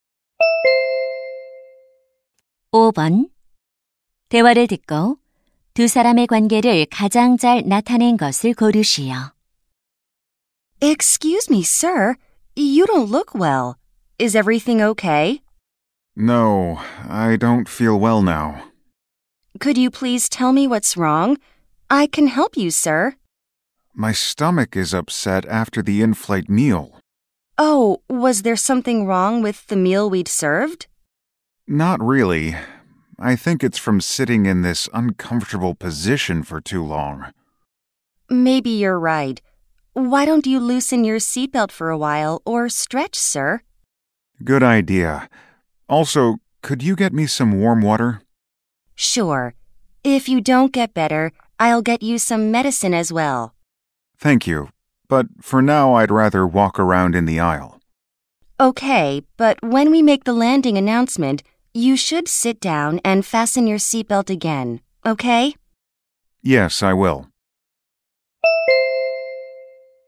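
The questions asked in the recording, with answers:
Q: 대화를 듣고 두 사람의 관계를 가장 잘 나타낸 것을 고르시오.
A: 승무원 - 승객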